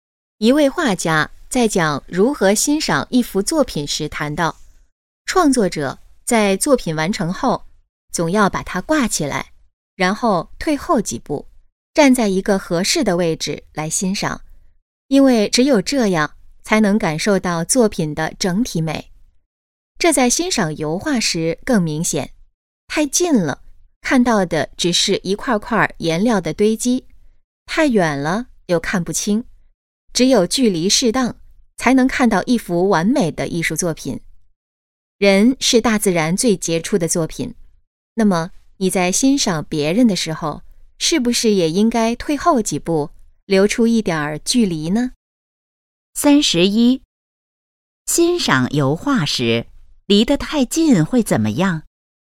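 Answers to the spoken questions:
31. 只看到一块块颜料的堆积
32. 欣赏别人时要保持一点距离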